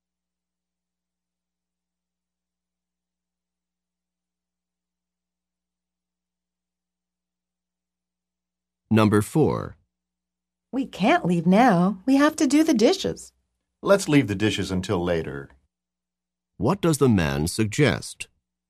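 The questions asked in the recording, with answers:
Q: What does the man suggest?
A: Doing the dishes later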